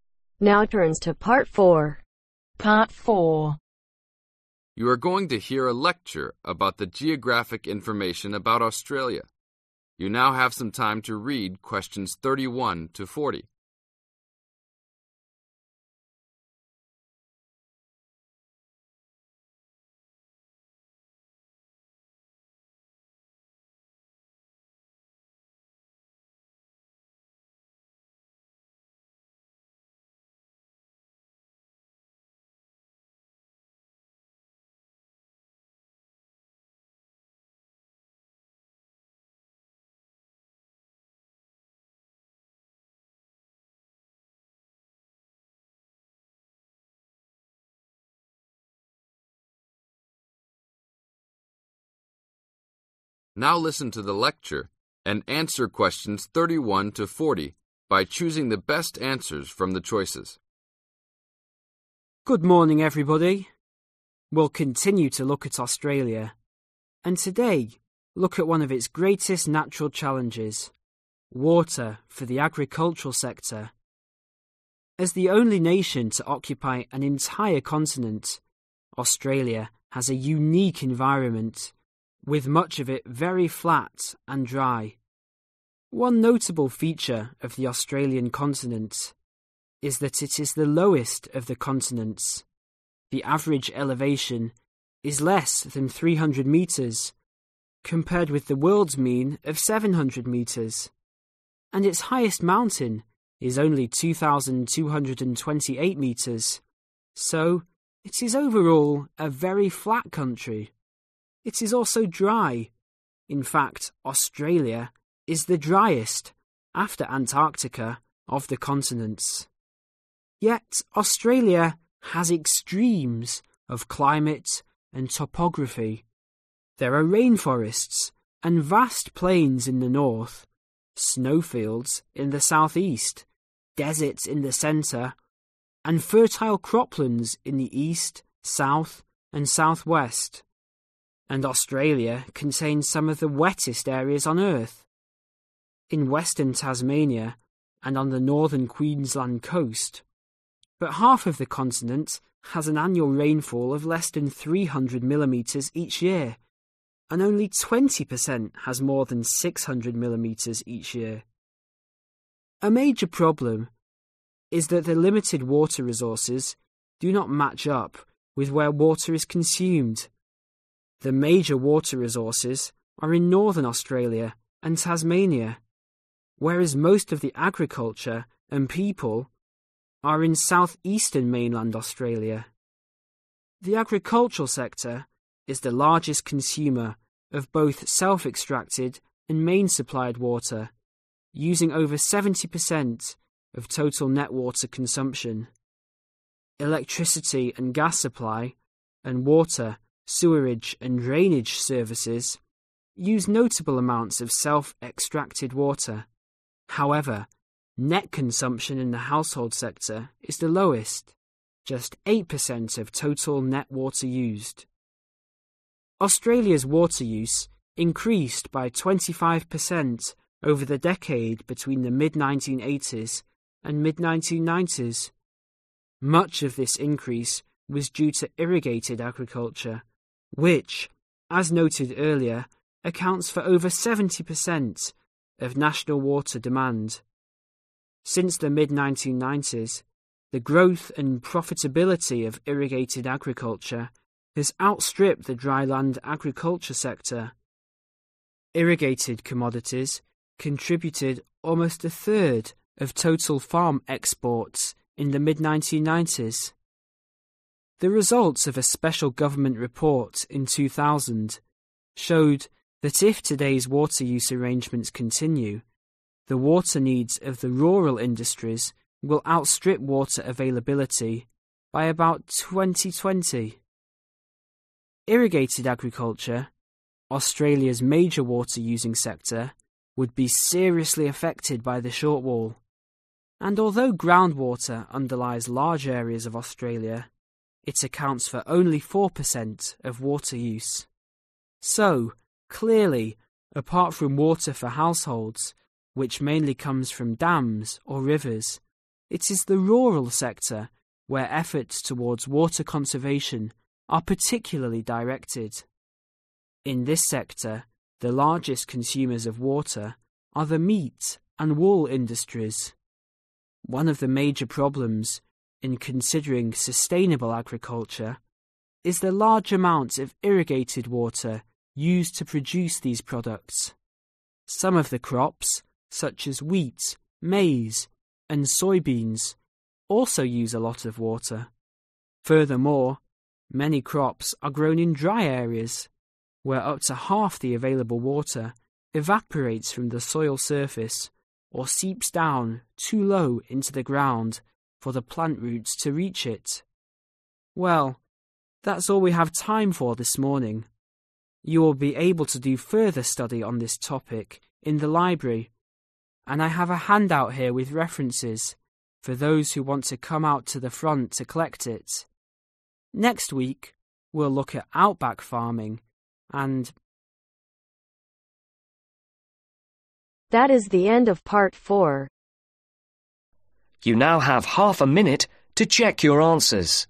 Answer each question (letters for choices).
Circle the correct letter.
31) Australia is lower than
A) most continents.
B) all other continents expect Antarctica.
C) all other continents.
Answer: C

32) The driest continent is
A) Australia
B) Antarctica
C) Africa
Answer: B

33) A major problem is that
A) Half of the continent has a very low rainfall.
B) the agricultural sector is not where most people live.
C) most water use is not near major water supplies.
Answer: C

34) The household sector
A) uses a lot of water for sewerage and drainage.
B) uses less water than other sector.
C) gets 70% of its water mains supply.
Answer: B

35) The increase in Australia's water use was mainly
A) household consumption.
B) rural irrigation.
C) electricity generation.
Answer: B

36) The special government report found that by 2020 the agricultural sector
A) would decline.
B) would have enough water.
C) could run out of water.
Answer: C

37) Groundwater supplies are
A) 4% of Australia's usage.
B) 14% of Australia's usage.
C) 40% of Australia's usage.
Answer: A